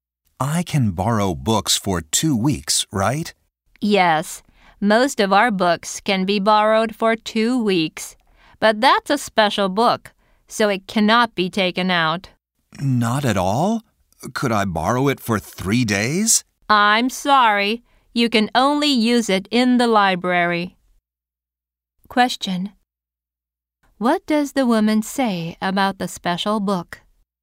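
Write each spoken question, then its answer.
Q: What does the woman say about the special book?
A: It can only be used in the library.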